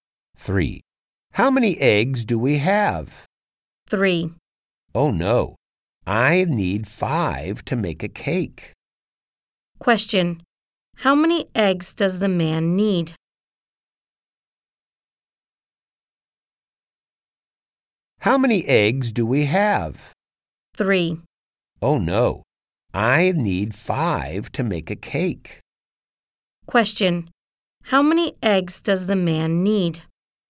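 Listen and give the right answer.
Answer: Five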